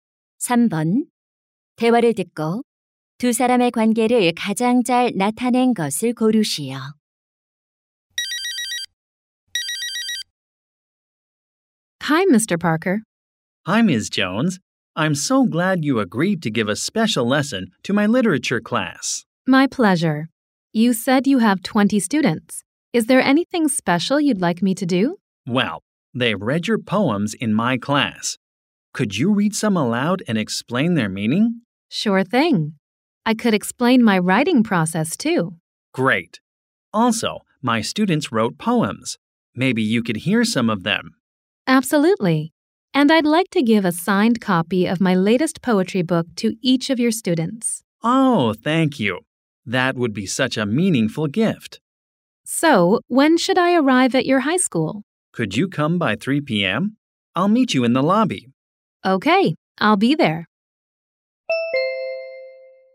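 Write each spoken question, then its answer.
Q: 대화를 듣고 두 사람의 관계를 가장 잘 나타낸 것을 고르시오.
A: 교사 - 시인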